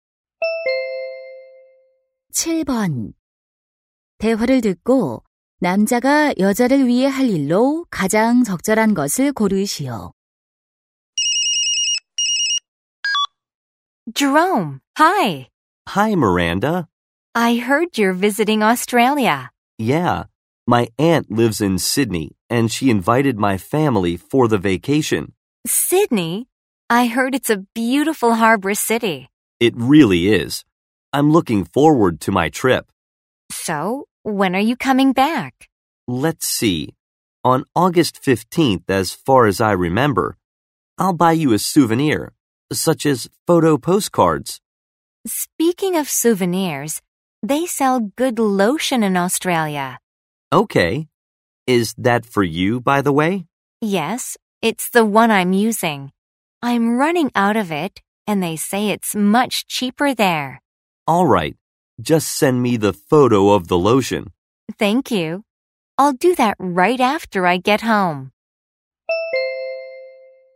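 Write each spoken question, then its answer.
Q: 대화를 듣고 남자가 여자를 위해 할 일로 가장 적절한 것을 고르시오.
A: 호주에서 로션 사 오기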